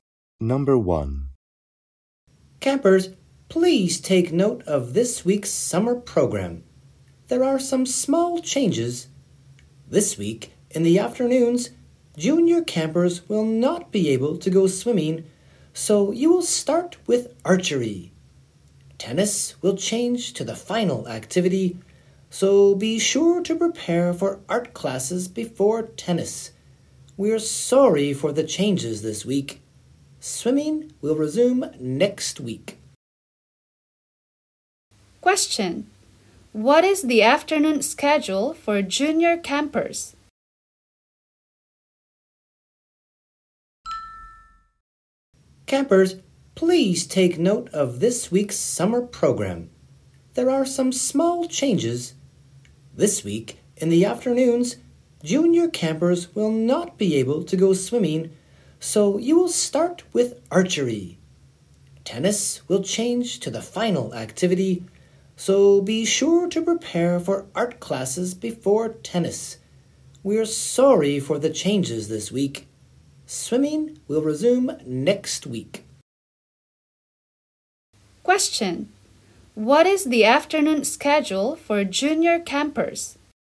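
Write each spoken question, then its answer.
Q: Question: What is the afternoon schedule for junior campers?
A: Archery, then art, then tennis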